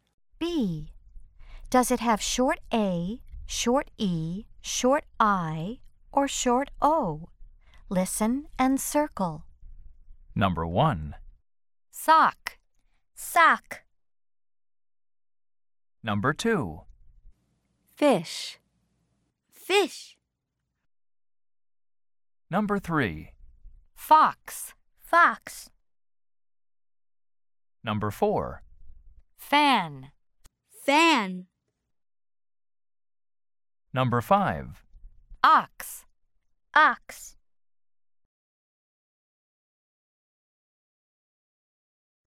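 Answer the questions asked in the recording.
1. short O
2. short I
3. short O
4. short A
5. short O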